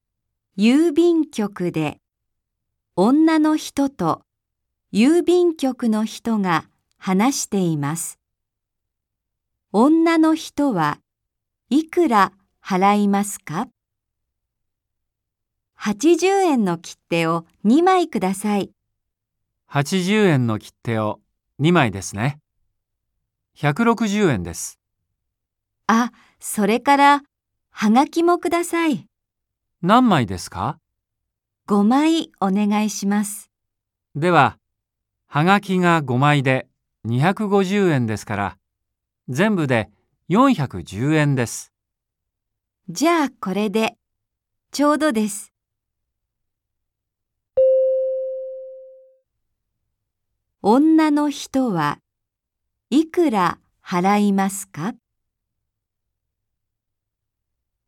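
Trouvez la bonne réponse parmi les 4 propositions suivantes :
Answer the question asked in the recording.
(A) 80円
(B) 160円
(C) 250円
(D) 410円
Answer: (D) 410円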